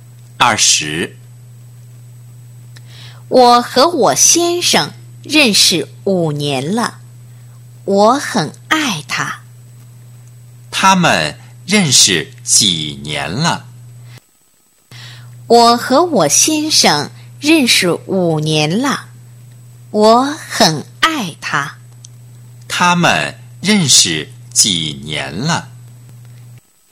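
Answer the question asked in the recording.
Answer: 5年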